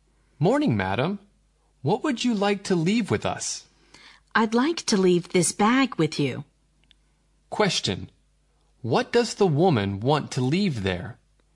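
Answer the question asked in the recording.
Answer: Her bag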